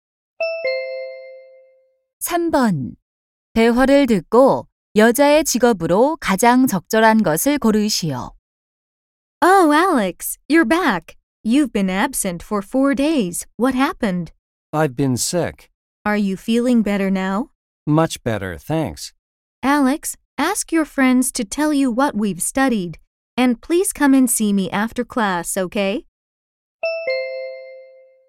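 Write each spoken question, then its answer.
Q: 대화를 듣고 여자의 직업으로 가장 적절한 것을 고르시오.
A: 교사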